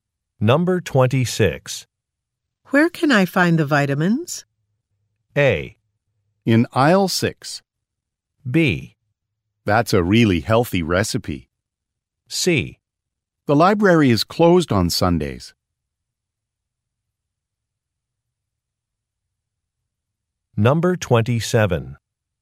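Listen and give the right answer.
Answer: A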